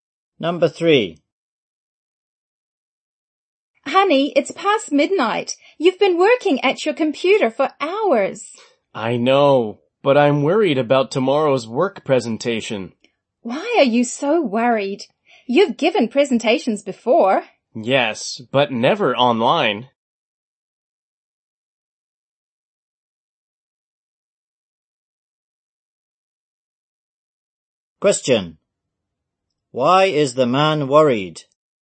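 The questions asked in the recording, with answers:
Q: Why is the man worried?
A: He has never given a presentation online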